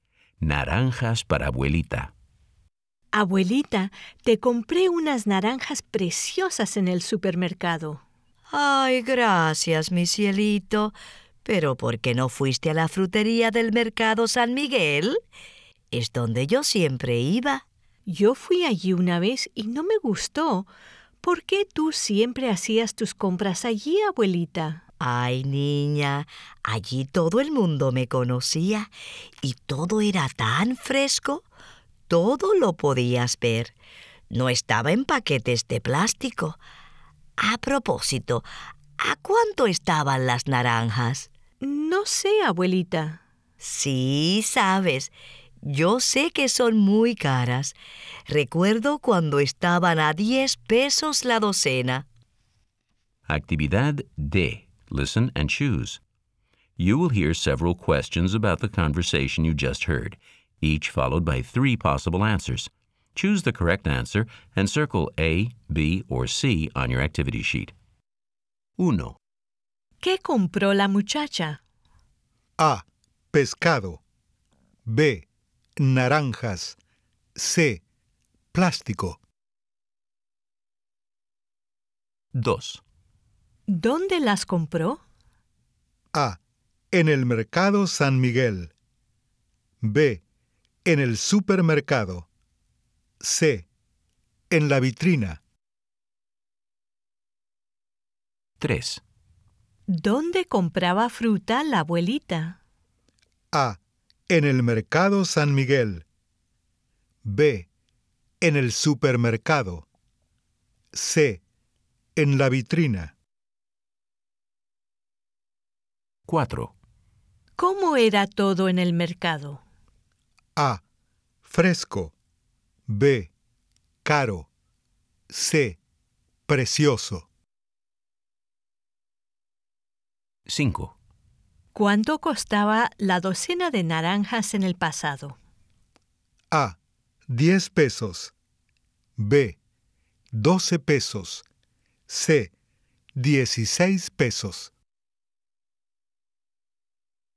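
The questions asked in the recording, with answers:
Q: ¿Qué compró la muchacha?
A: B: Naranjas

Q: ¿Dónde las compró?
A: B: En el supermercado

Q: ¿Dónde compraba fruta la abuelita?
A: A: En el Mercado San Miguel

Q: ¿Cómo era todo en el mercado?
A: A: Fresco

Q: ¿Cuánto costaba la docena de naranjas en el pasado?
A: A: 10 pesos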